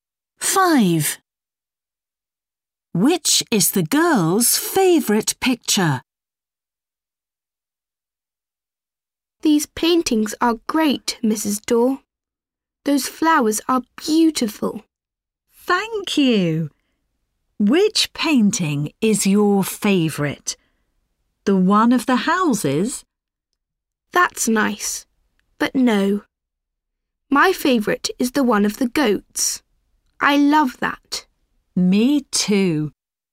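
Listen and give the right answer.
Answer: The one of the goats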